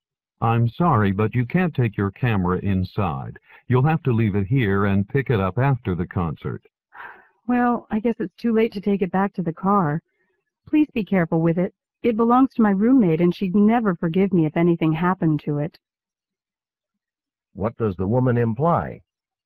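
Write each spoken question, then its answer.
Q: What does the woman imply?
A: She will leave her camera there, though she is worried about it.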